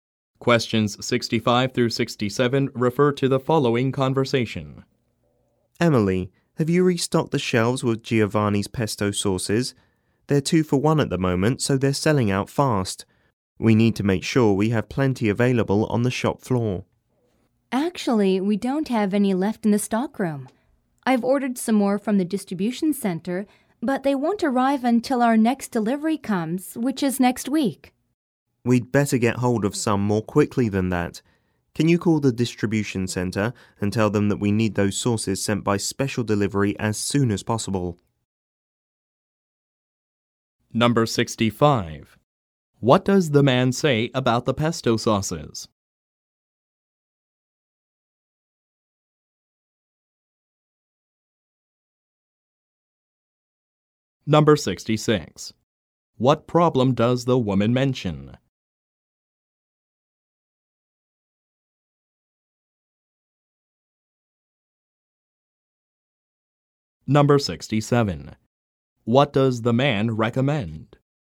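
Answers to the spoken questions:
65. They are on a 2-for-1 offer and selling out fast.
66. There are none left in the stockroom, and more won't arrive until next week.
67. Calling the distribution center to ask them to send the sauces by special delivery.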